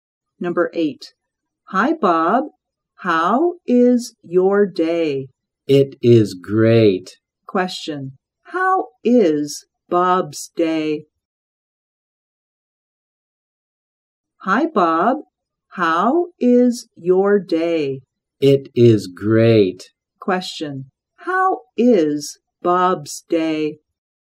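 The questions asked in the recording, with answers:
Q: How is Bob's day?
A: It is great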